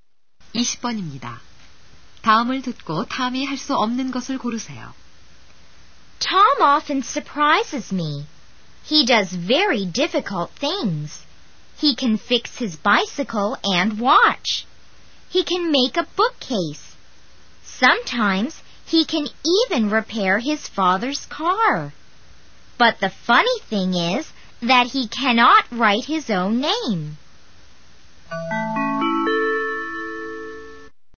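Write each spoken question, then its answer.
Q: 다음을 듣고 탐이 할 수 없는 것을 고르세요.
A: 자기 이름 쓰기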